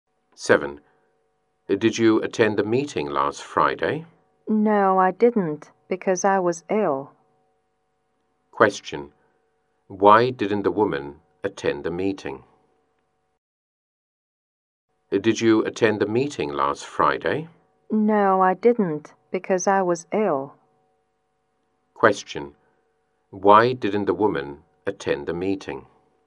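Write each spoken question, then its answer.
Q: Why didn't the woman attend the meeting?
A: Because she was ill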